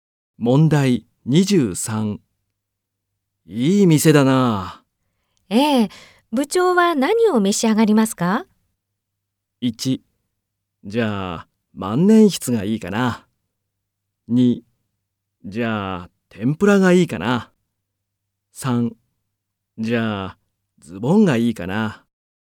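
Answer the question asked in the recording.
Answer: 2: じゃあ、天ぷらがいいかな。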